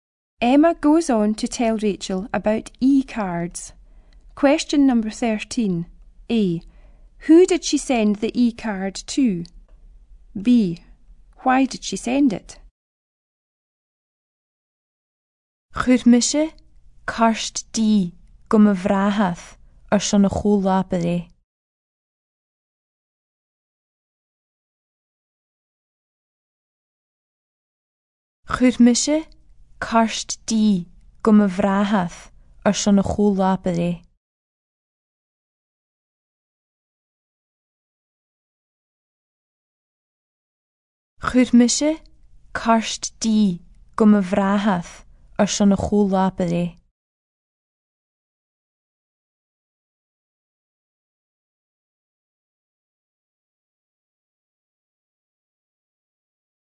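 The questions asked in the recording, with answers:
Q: B. Why did she send it?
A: For his birthday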